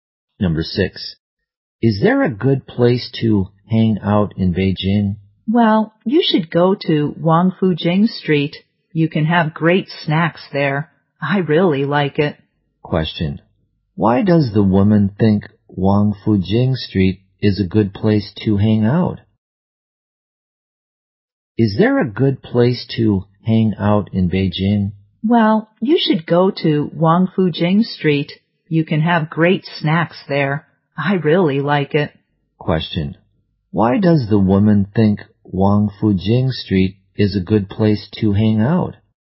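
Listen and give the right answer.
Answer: You can have great snacks there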